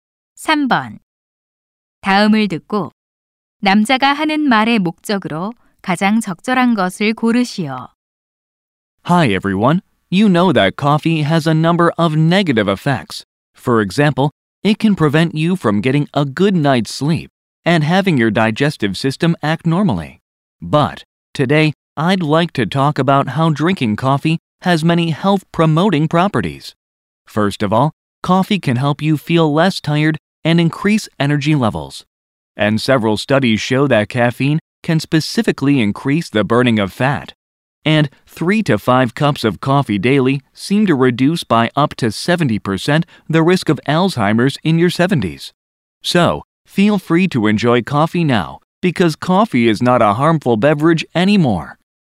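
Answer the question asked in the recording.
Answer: 커피가 건강에 주는 이점을 알려 주려고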